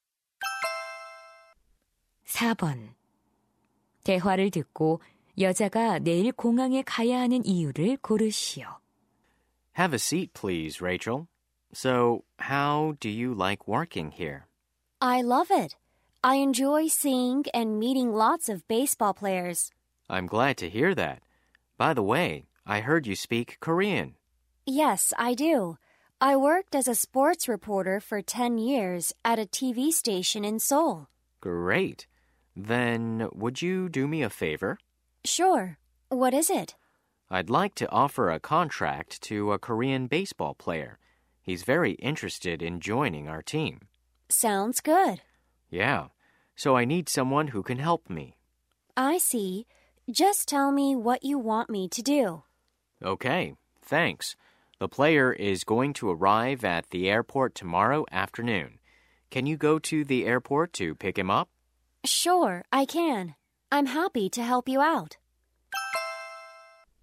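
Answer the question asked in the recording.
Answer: 한국 야구 선수를 마중하려고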